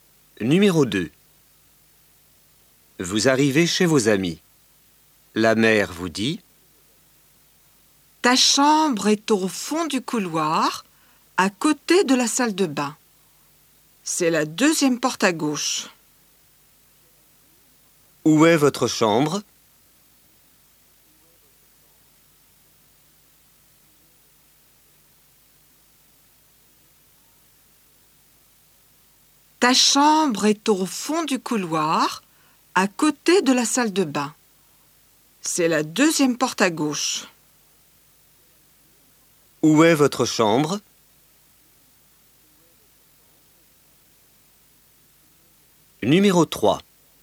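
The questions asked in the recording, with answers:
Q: Où est votre chambre?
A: Au fond du couloir, à côté de la salle de bain, deuxième porte à gauche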